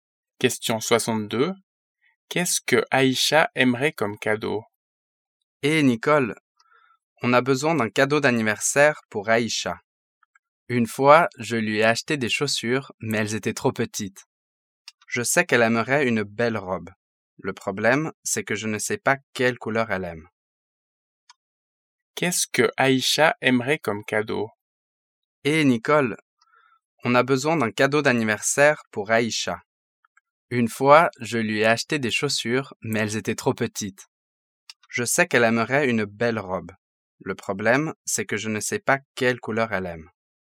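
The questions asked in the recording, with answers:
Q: Qu'est-ce que Aïcha aimerait comme cadeau?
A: Une belle robe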